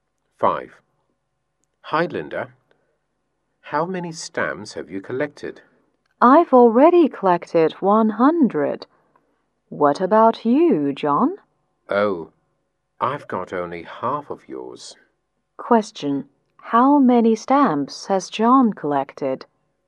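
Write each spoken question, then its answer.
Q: How many stamps has John collected?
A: 50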